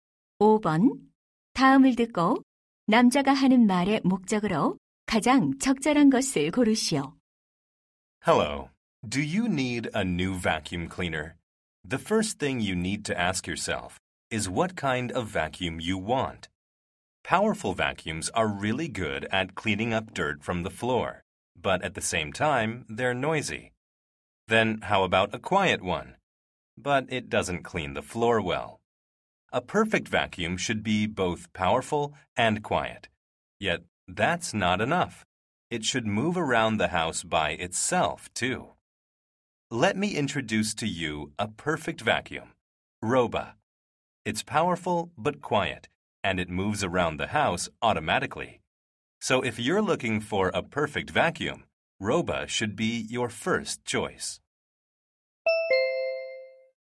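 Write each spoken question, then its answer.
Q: 다음을 듣고 남자가 하는 말의 목적으로 가장 적절한 것을 고르시오.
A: 진공청소기 Roba를 광고하려고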